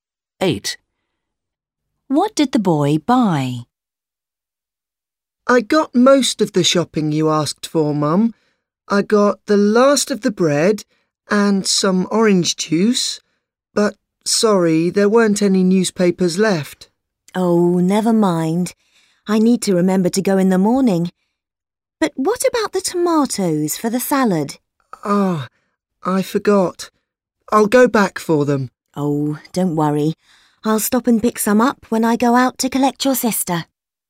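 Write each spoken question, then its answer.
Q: What did the boy buy?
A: Bread and orange juice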